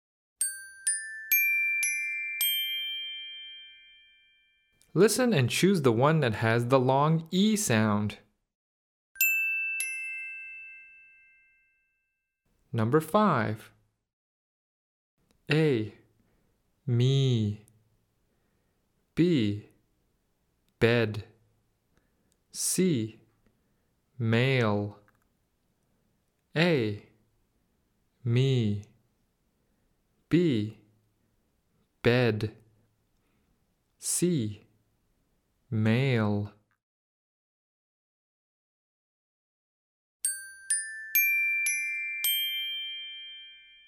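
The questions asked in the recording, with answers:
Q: Listen and choose the one that has the long E sound.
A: A: Me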